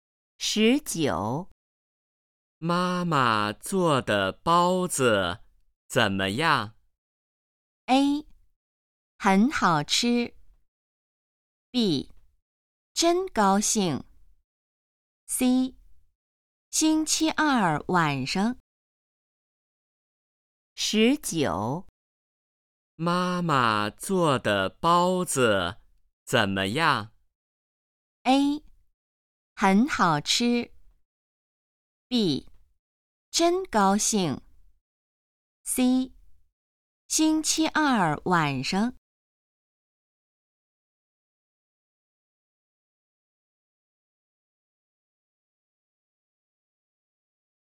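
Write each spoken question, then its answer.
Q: 妈妈做的包子怎么样?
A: A: 很好吃。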